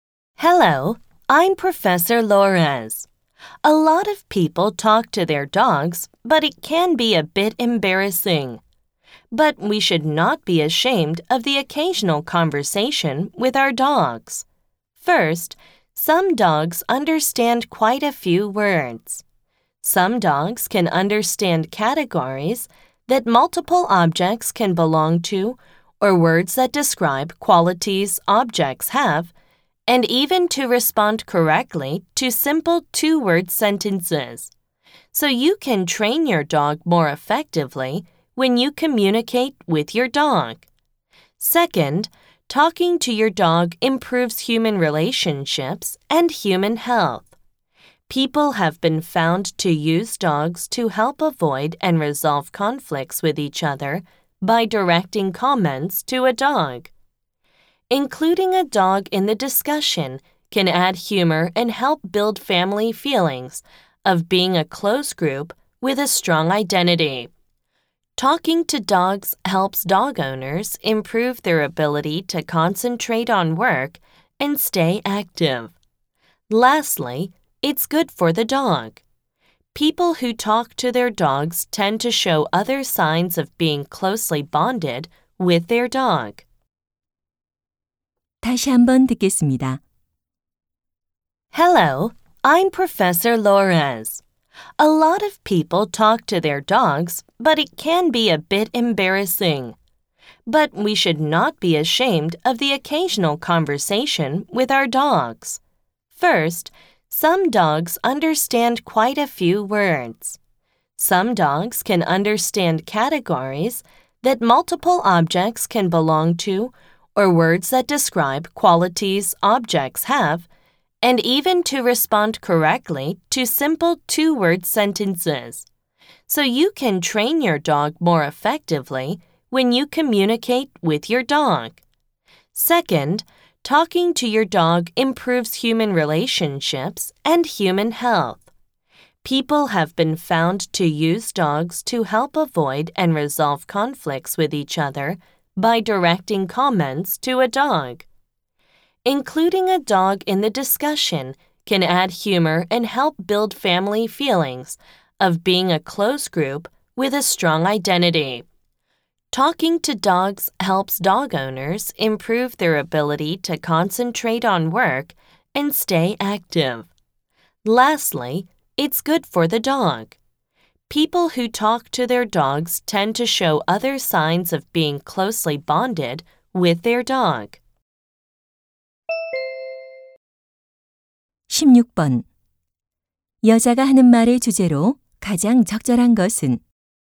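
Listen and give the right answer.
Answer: 개에게 말을 거는 것의 이점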